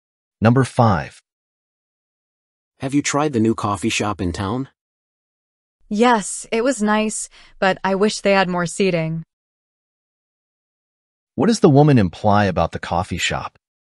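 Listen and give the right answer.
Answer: It doesn't have enough seating.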